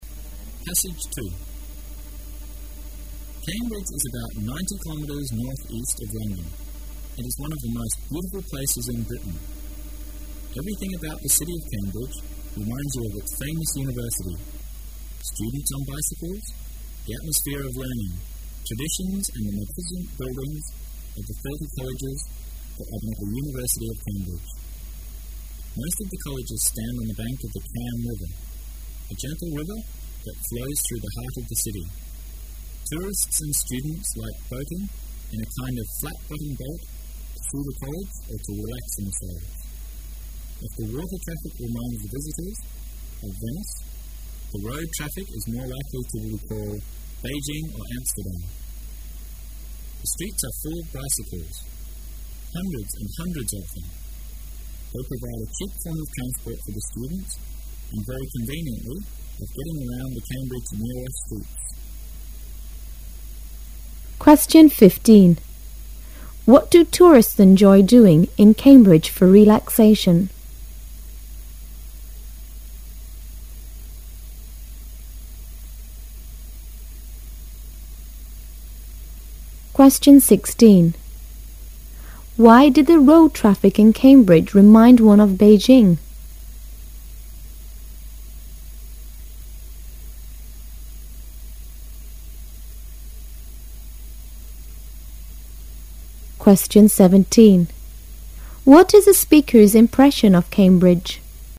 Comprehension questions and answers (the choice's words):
What is the speaker's impression of Cambridge?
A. He thinks the city is too crowded.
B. He likes the place very much.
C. He thinks the streets are too narrow.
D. He admires the comfortable life of the students there.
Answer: He likes the place very much.

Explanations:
文章开头说"It one of the most beautiful places in Britain."说明作者喜欢它。

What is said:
[解析] 15-17 Cambridge is about 90 kilometres northeast of London. It is one of the most beautiful places in Britain. Everything about the city of Cambridge reminds you of its famous university: students on bicycles, the atmosphere of learning, traditions and the magnificent buildings of the 30 colleges that are in the University of Cambridge. Most of the colleges stand on the bank of the Cam River, a gentle river that flows through the heart of the city. Tourists and students like boating in a kind of flat-bottom boat to see the colleges or to relax themselves. If the water traffic reminds the visitors of Venice, the road traffic is more likely to recall Beijing or Amsterdam. The streets are full of bicycles, hundreds and hundreds of them. They provide a cheap form of transport for the students and very conveniently of getting around the Cambridge's nearer streets. What do tourists enjoy doing in Cambridge for relaxation?
[解析] Why did the road traffic in Cambridge remind one of Beijing?